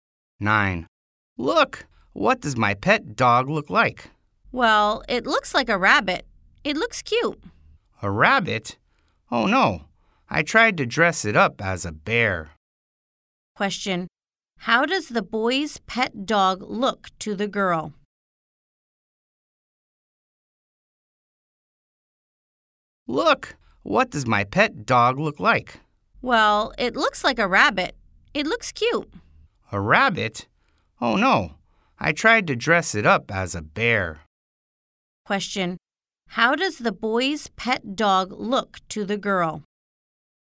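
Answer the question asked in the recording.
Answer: Like a rabbit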